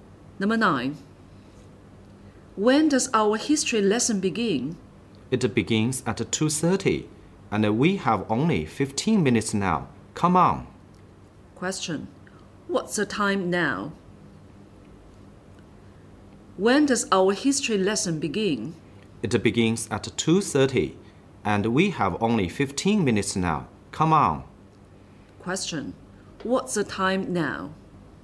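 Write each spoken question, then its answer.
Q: What's the time now?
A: 2:15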